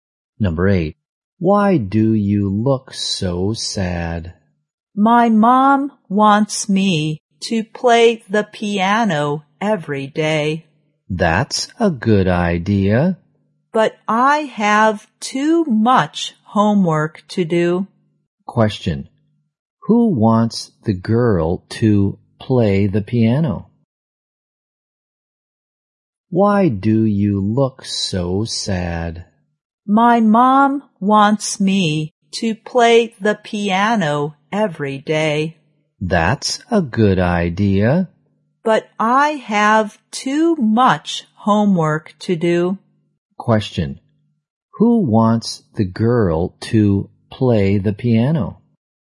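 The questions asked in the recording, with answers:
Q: Who wants the girl to play the piano?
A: Her mom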